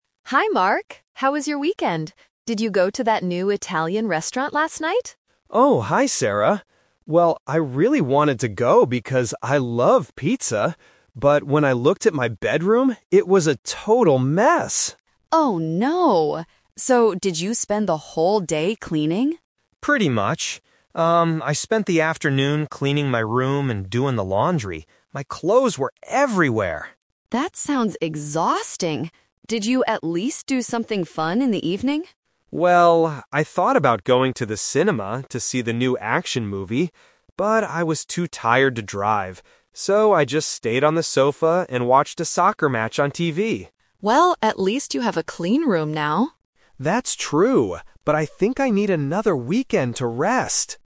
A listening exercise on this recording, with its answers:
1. What did Mark want to do on Saturday night?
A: Go to an Italian restaurant.

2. What did Mark do during the afternoon?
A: He cleaned his room and did the laundry.

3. Why didn't Mark go to the cinema?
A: Because he felt too tired to drive.

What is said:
Sarah: Hi, Mark! How was your weekend? Did you go to that new Italian restaurant last night?
Mark: Oh, hi Sarah. Well, I really wanted to go because I love pizza. But when I looked at my bedroom, it was a total mess!
Sarah: Oh, no! So, did you spend the whole day cleaning?
Mark: Pretty much. Um, I spent the afternoon cleaning my room and doing the laundry. My clothes were everywhere!
Sarah: That sounds exhausting. Did you at least do something fun in the evening?
Mark: Well, I thought about going to the cinema to see the new action movie. But I was too tired to drive. So, I just stayed on the sofa and watched a soccer match on TV.
Sarah: Well, at least you have a clean room now!
Mark: That's true, but I think I need another weekend to rest!